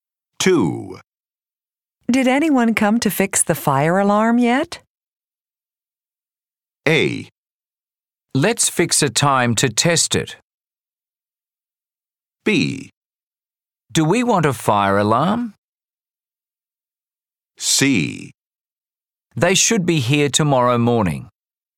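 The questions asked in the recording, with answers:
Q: Did anyone come to fix the fire alarm yet?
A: C: They should be here tomorrow morning.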